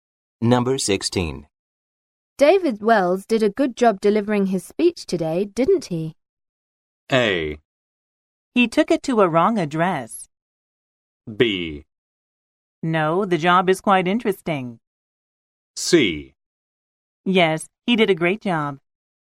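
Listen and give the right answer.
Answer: C: Yes, he did a great job.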